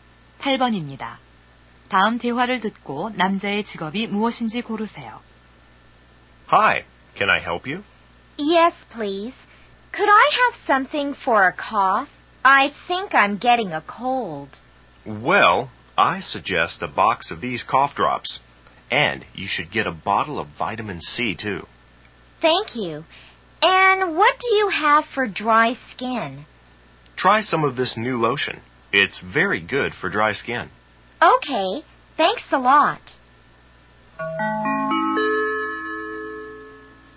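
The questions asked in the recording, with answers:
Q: 다음 대화를 듣고 남자의 직업이 무엇인지 고르세요.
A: 약사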